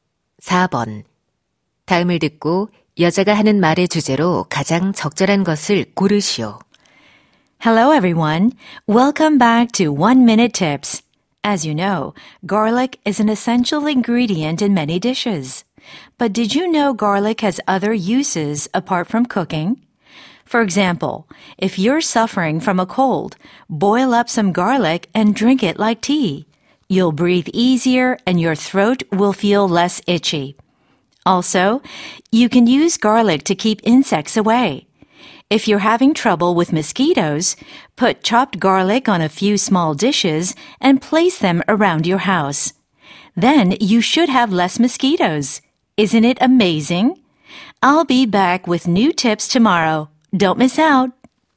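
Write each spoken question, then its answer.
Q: 다음을 듣고 여자가 하는 말의 주제로 가장 적절한 것을 고르시오.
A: 요리 외의 마늘의 다양한 용도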